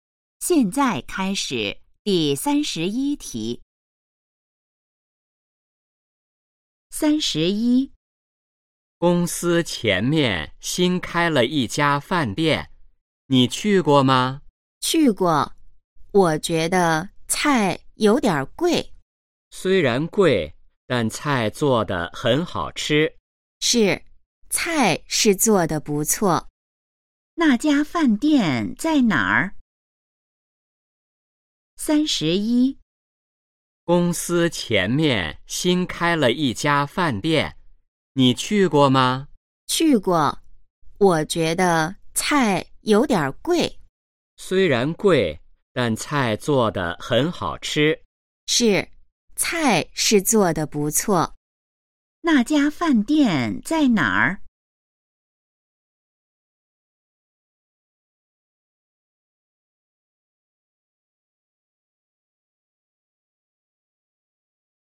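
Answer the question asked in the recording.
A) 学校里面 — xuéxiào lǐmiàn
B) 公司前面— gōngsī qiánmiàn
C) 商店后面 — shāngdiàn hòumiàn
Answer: B) 公司前面— gōngsī qiánmiàn

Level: HSK2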